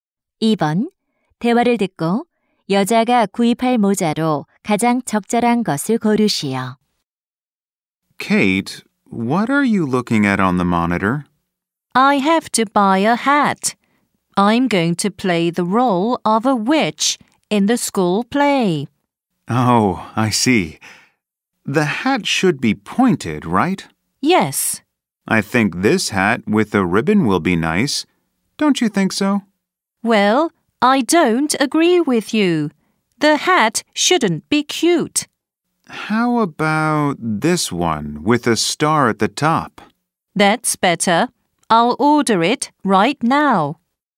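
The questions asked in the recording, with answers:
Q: 대화를 듣고 여자가 구입할 모자로 가장 적절한 것을 고르시오.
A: 꼭대기에 별이 달린 뾰족한 모자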